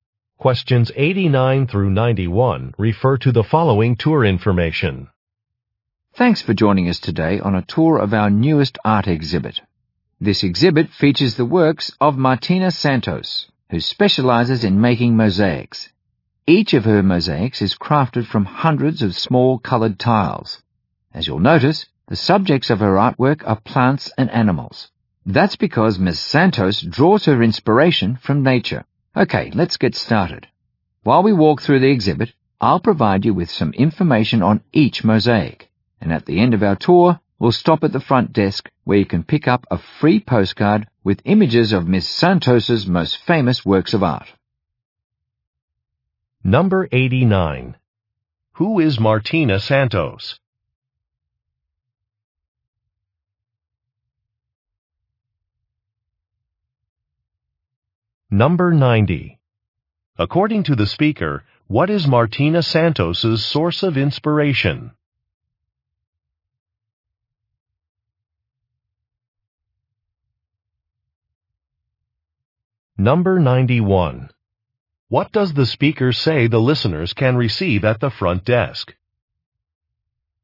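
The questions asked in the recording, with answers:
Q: Who is Martina Santos?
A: An artist who makes mosaics

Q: According to the speaker, what is Martina Santos's source of inspiration?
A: Nature

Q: What does the speaker say the listeners can receive at the front desk?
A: A free postcard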